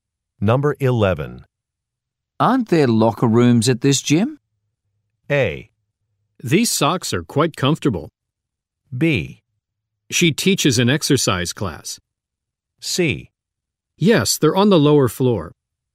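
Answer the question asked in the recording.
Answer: C: Yes, they're on the lower floor.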